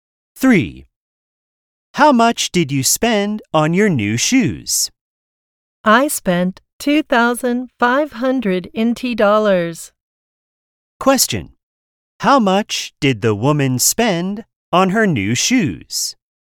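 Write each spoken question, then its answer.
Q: How much did the woman spend on her new shoes?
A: $2,500 NT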